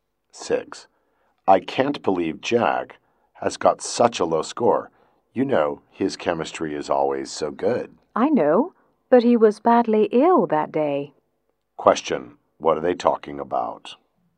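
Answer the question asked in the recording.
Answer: Jack's low score in a chemistry test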